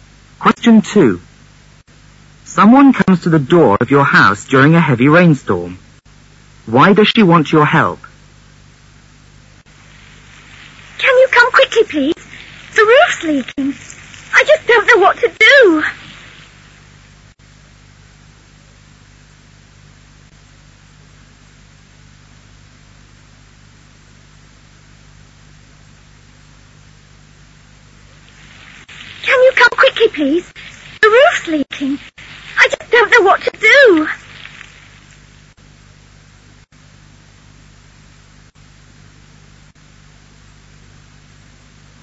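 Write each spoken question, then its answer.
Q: Why does she want your help?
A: Her roof is leaking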